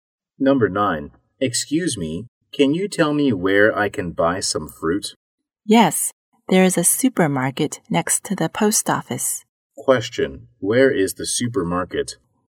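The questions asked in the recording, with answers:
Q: where is the supermarket?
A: Next to the post office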